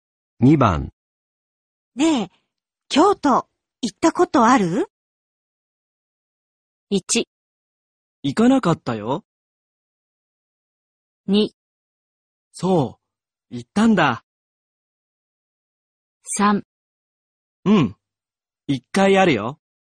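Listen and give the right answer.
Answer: 3: うん、一回あるよ。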